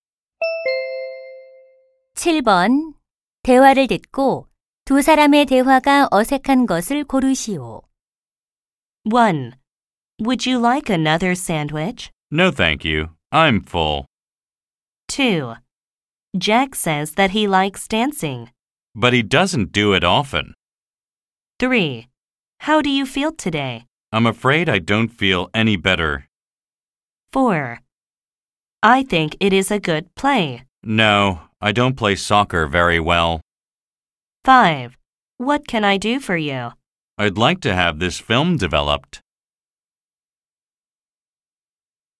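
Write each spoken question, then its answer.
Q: 대화를 듣고 두 사람의 대화가 어색한 것을 고르시오.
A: 4: I think it is a good play. / No, I don't play soccer very well.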